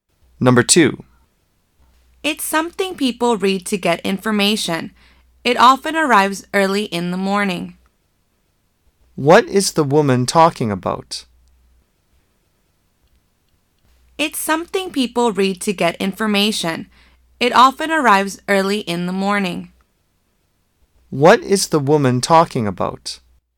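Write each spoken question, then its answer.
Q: What is the woman talking about?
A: A newspaper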